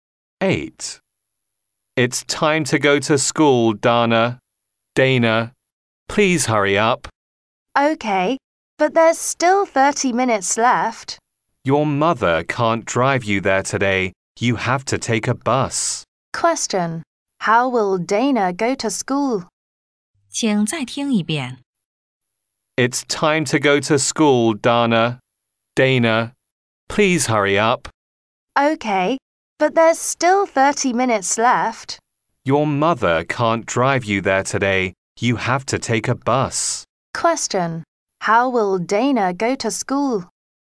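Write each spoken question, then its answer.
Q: How will Dana go to school?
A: By bus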